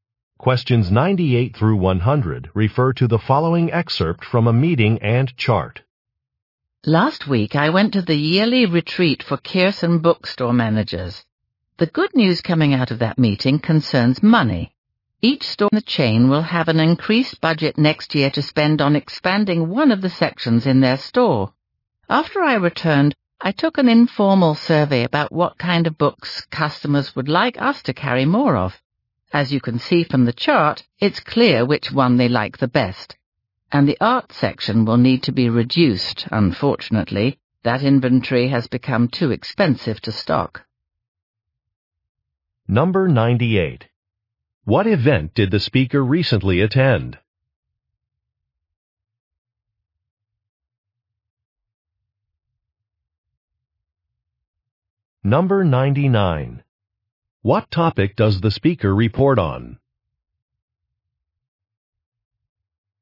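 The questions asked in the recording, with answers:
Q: What event did the speaker recently attend?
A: A yearly retreat for managers

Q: What topic does the speaker report on?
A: An increased budget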